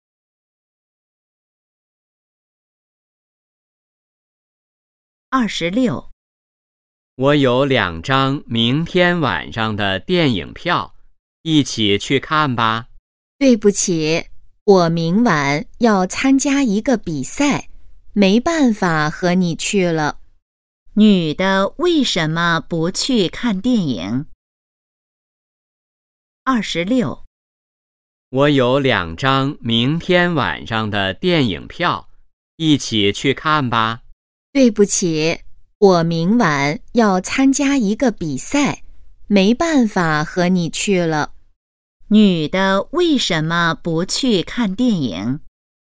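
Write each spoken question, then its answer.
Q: 女的为什么不去看电影?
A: 她明晚要参加一个比赛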